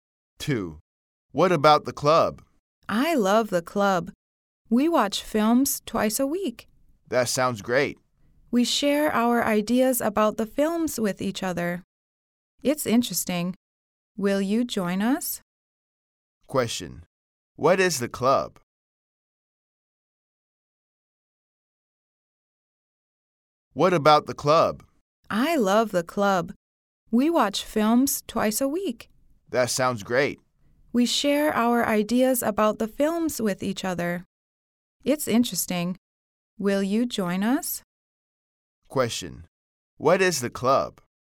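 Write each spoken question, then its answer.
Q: What is the club?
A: A film club: they watch films twice a week and share ideas about them.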